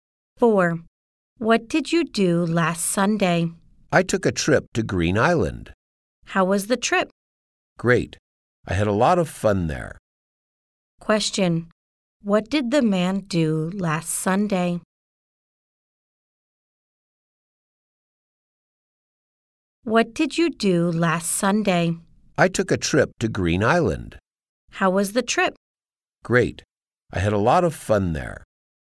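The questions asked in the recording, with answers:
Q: What did the man do last Sunday?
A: He took a trip to Green Island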